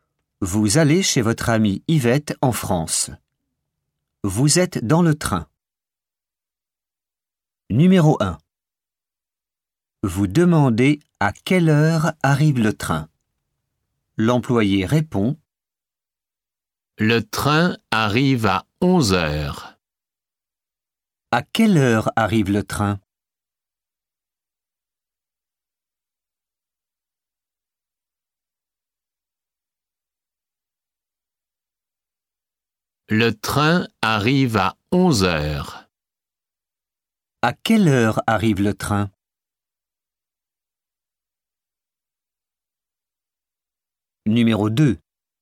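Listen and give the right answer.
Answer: À 11 heures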